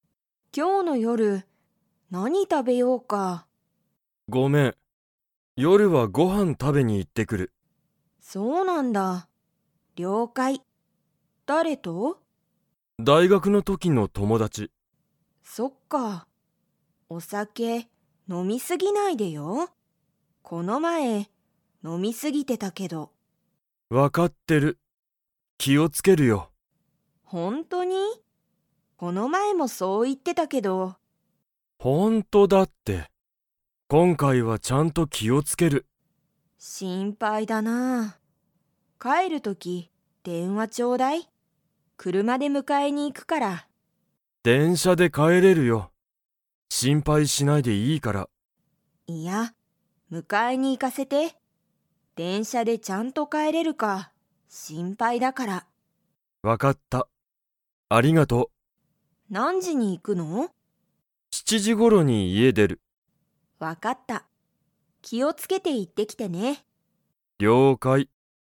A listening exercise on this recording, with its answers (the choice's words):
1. アキラは、 の時(とき)の友達(ともだち)とご飯(はん)を食(た)べに行(い)く。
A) 大学(だいがく)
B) 仕事(しごと)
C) 子供(こども)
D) 了解(りょうかい)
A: 大学(だいがく)

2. ユウコはアキラを迎(むか)えに行(い)きますか?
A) はい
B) いいえ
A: はい

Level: Level 3